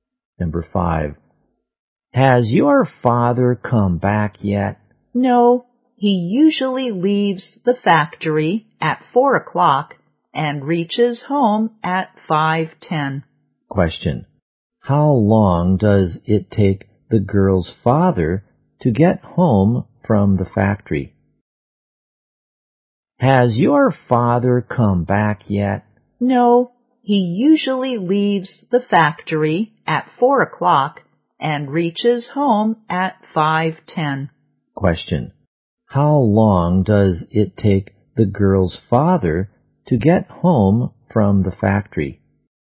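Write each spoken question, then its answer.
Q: how long does it take the girl's father to get home from the factory?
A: One hour and ten minutes.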